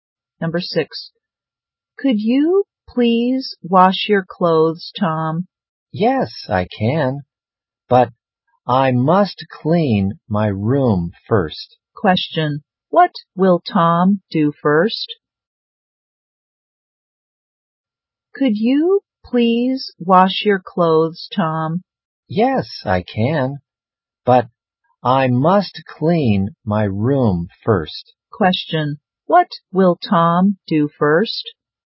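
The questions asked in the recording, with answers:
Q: Question, what will Tom do first?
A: Clean his room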